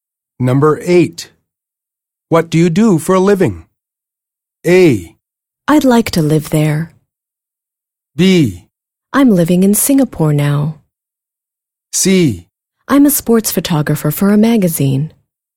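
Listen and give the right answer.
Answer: C: I'm a sports photographer for a magazine.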